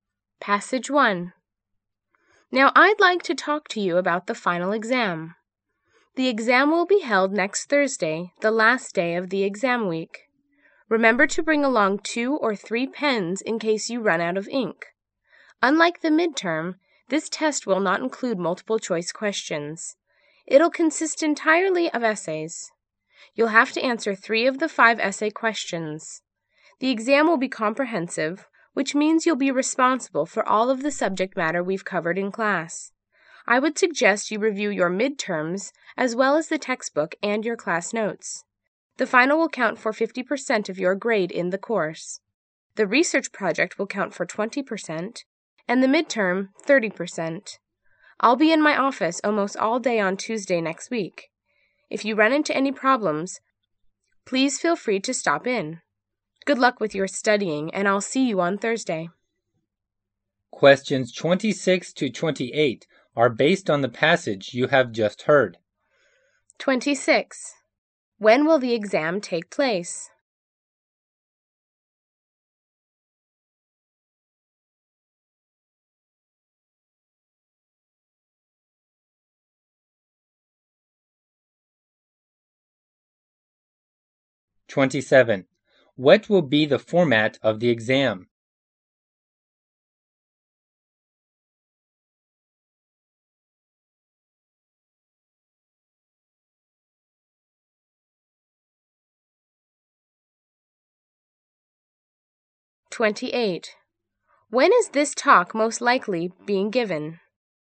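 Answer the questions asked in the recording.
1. Next Thursday
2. All essays; answer 3 of 5 questions
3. At the end of the term, before exam week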